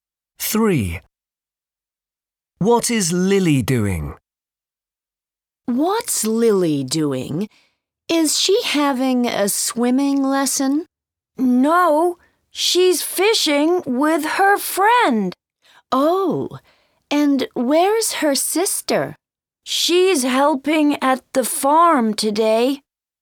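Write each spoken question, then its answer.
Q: What is Lily doing?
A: Fishing with her friend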